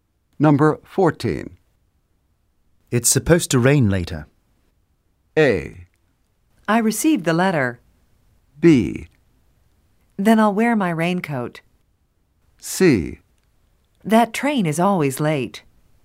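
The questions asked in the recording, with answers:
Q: It's supposed to rain later.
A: B: Then I'll wear my raincoat.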